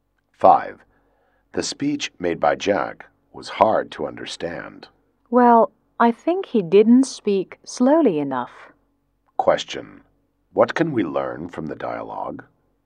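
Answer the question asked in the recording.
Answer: Jack spoke too fast, so his speech was hard to understand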